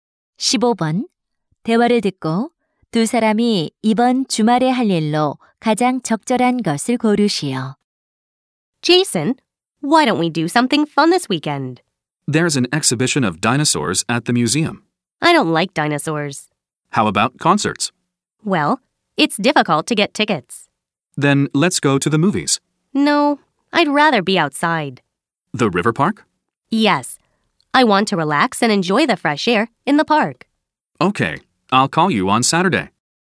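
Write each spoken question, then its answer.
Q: 대화를 듣고 두 사람이 이번 주말에 할 일로 가장 적절한 것을 고르시오.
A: 강변 공원에 가기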